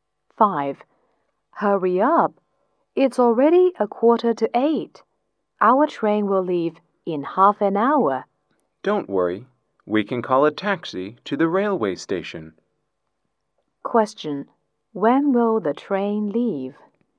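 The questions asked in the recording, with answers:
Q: Question, when will the train leave?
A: At 8:15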